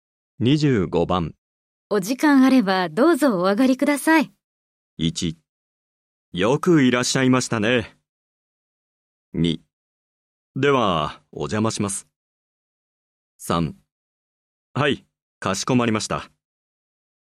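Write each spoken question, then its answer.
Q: お時間あればどうぞお上がりください。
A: 2: では、お邪魔します。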